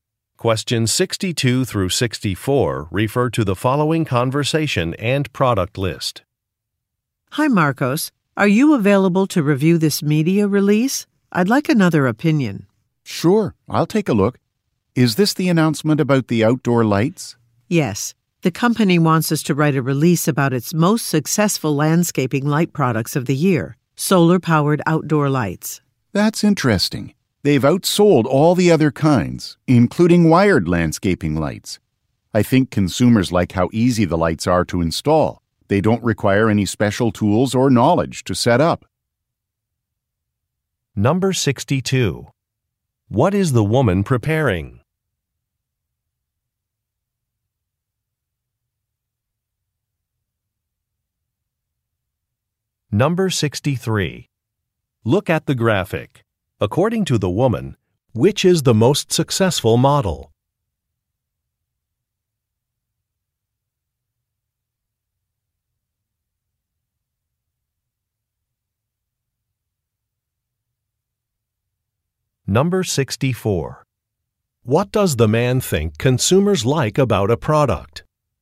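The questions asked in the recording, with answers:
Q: What is the woman preparing?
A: A media release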